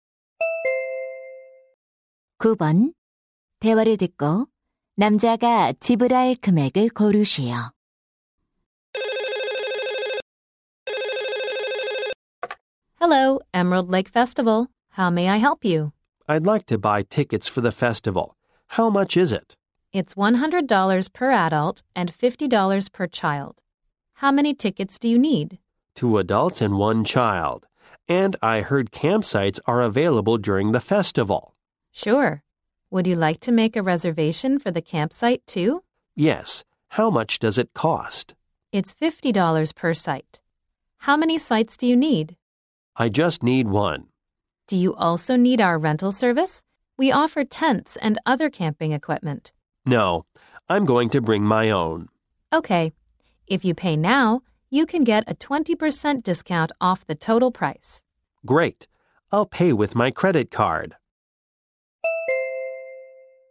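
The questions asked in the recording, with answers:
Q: 대화를 듣고 남자가 지불할 금액을 고르시오.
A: 240달러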